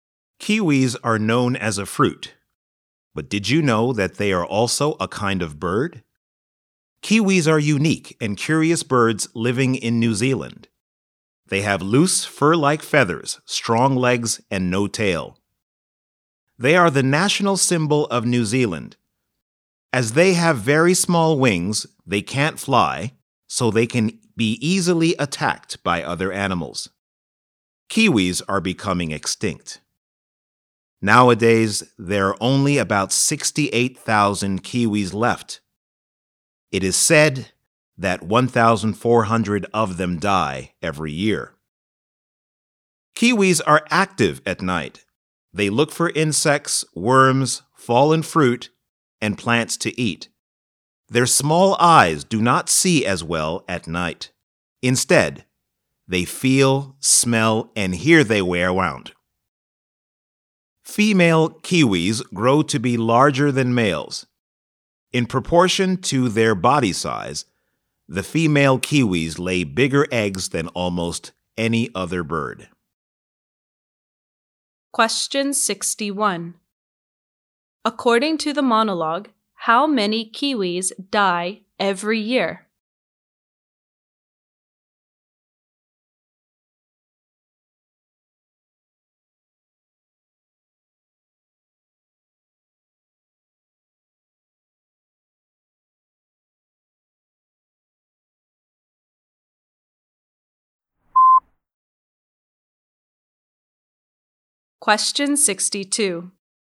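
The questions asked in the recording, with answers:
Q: According to the monologue, how many kiwis die every year?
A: About 1,400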